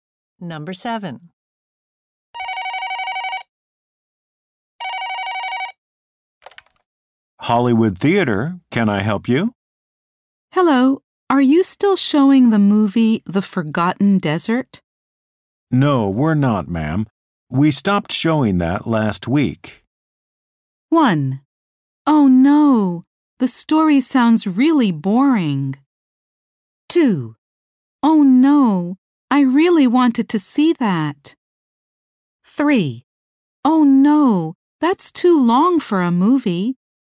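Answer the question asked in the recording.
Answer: 2: Oh no, I really wanted to see that.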